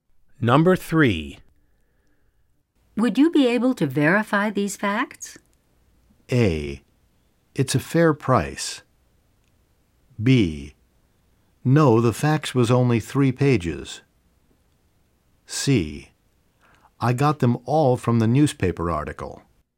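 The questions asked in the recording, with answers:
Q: Would you be able to verify these facts?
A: C: I got them all from the newspaper article.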